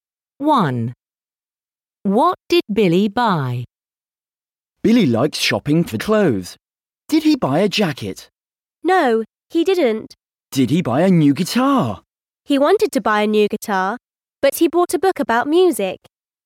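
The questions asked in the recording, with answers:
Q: What did Billy buy?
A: a book about music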